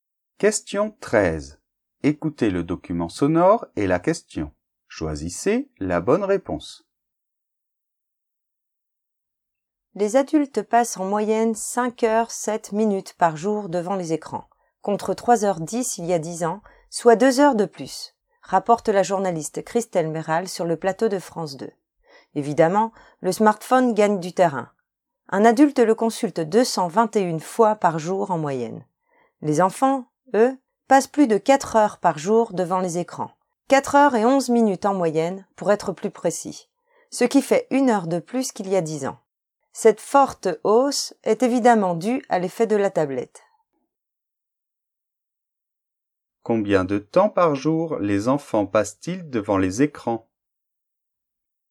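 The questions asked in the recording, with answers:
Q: Combien de temps par jour les enfants passent-ils devant les écrans ?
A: 4h11 en moyenne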